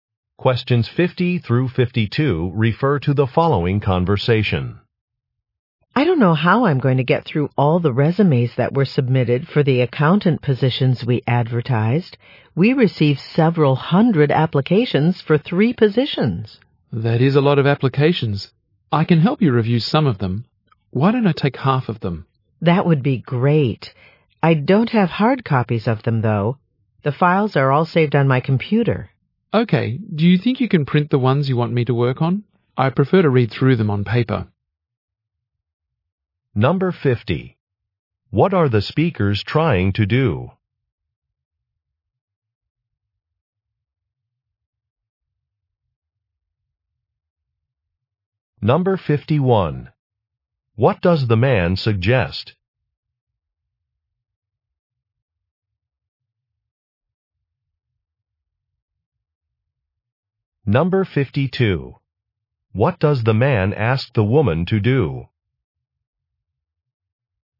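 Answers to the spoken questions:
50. Review resumes to hire accountants
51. Taking half of the applications to review
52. Print the resumes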